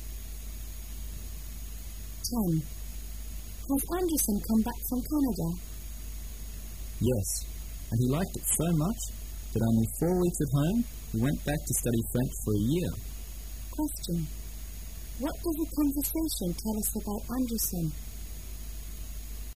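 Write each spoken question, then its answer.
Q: What does the conversation tell us about Anderson?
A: He went back to Canada to study French for a year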